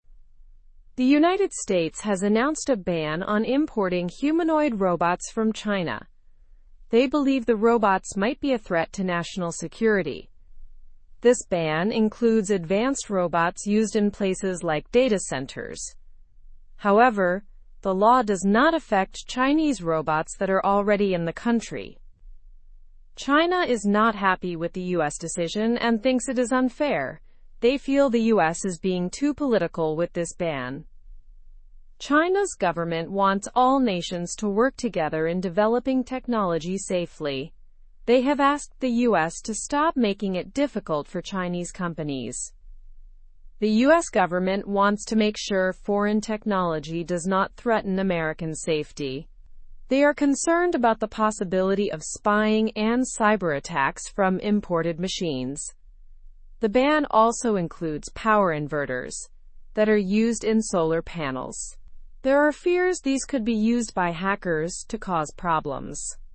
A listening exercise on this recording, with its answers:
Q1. What has the US banned?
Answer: The US has banned importing humanoid robots from China.

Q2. Why did the US decide to make this ban?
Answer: The US believes the robots could be a threat to national security.

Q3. What does the ban include aside from humanoid robots?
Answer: The ban also includes power inverters used in solar panels.

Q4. How does China feel about the US ban?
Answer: China is unhappy and sees it as an unfair trade practice.

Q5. What does China want countries to do about technology?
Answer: China wants countries to cooperate in developing technology responsibly.

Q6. What are some of the US government's concerns about imported machines?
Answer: The US is concerned about spying and cyberattacks.

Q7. Are Chinese robots already in America affected by the ban?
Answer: No, the ban does not affect Chinese robots that are already in America.

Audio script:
The United States has announced a ban on importing humanoid robots from China. They believe the robots might be a threat to national security. This ban includes advanced robots used in places like data centers. However, the law does not affect Chinese robots that are already in the country.
China is not happy with the US decision and thinks it is unfair. They feel the US is being too political with this ban. China's government wants all nations to work together in developing technology safely. They have asked the US to stop making it difficult for Chinese companies.
The US government wants to make sure foreign technology does not threaten American safety. They are concerned about the possibility of spying and cyberattacks from imported machines. The ban also includes power inverters that are used in solar panels. There are fears these could be used by hackers to cause problems.

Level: Level 2